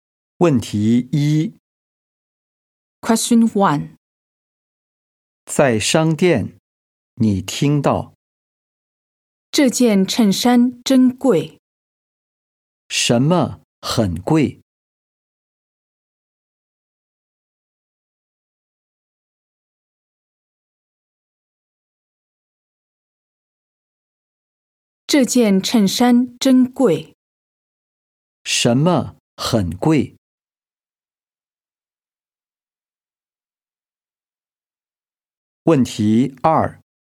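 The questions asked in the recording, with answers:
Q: 什么很贵?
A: 这件衬衫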